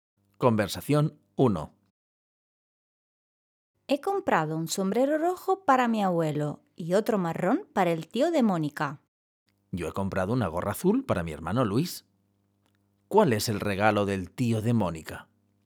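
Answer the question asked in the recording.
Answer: Un sombrero marrón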